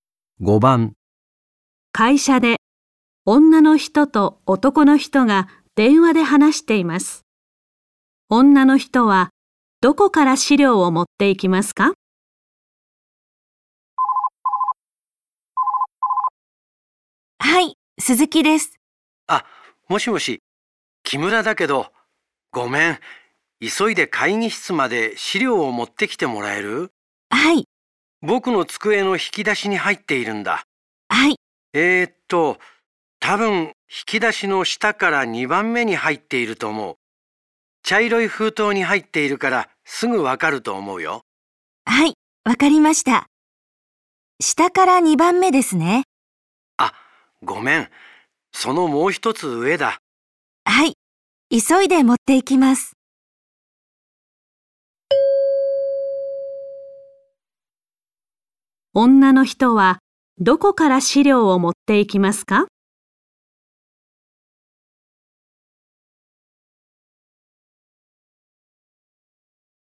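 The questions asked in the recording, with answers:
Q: 女の人はどこから資料を持っていきますか?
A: 引き出しの下から3番目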